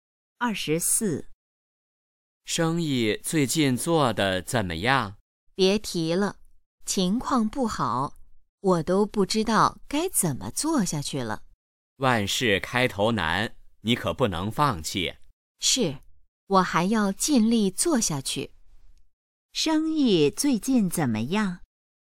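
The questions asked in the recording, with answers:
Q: 生意最近怎么样?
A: 不好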